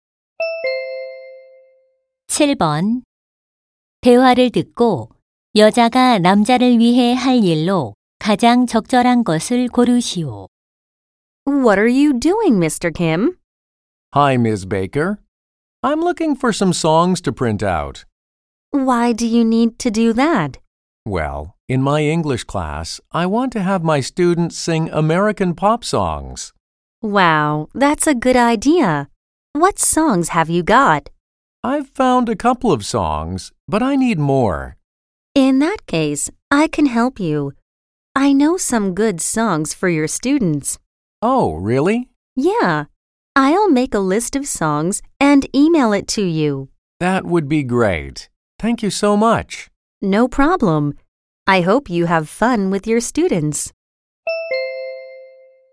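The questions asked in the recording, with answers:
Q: 대화를 듣고 여자가 남자를 위해 할 일로 가장 적절한 것을 고르시오.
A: 노래 목록을 만들어 이메일로 보내기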